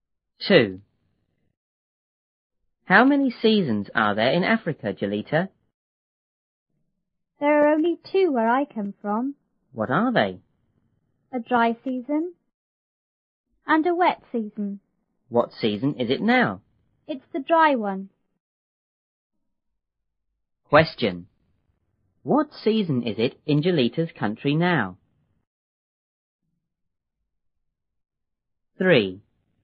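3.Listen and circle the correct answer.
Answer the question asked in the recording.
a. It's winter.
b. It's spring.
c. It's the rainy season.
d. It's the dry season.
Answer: d. It's the dry season.

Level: 六年级下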